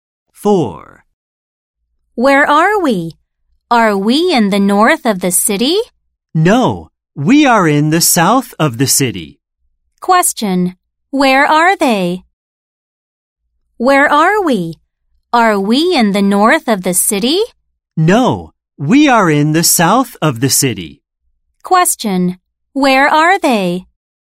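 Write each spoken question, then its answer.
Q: Question, where are they?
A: In the south of the city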